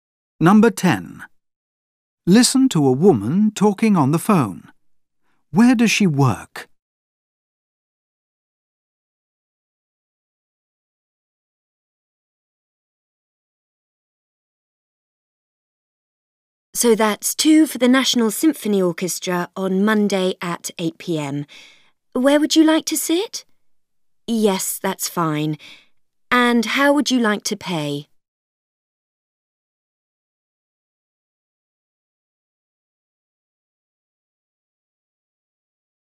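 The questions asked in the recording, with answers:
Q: Where does she work?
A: At a concert ticket box office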